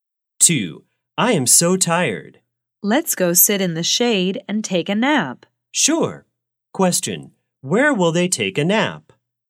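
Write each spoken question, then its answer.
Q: Question, where will they take a nap?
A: In the shade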